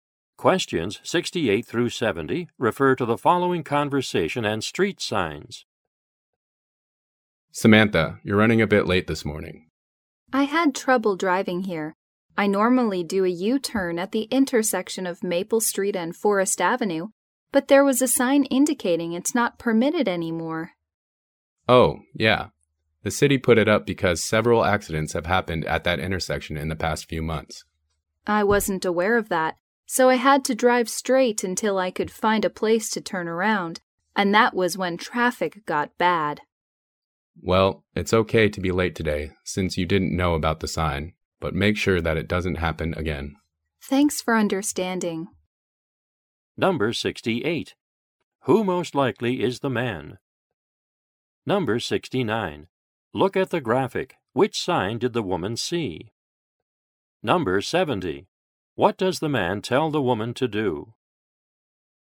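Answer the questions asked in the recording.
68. The woman's supervisor
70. Not be late again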